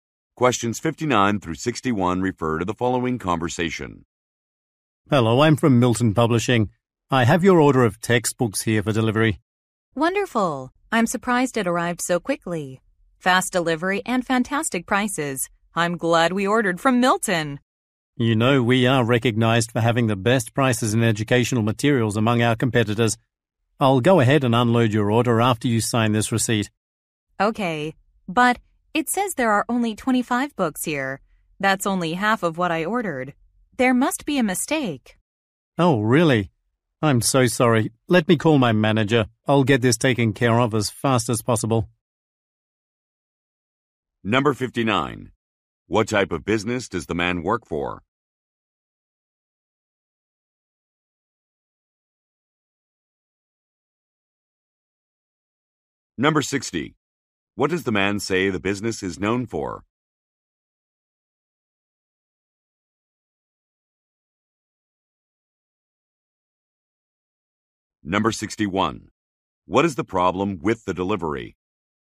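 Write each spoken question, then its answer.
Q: What type of business does the man work for?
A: A publishing company

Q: What does the man say the business is known for?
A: Having the best prices

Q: What is the problem with the delivery?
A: Only half of the books were delivered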